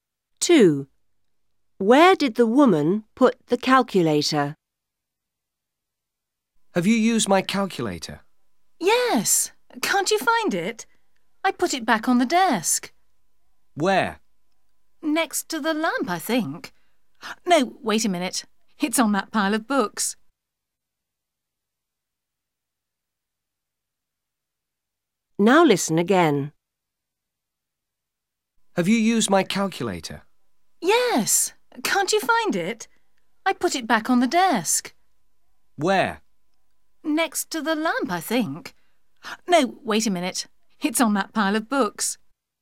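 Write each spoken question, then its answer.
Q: Where did the woman put the calculator?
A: On the pile of books on the desk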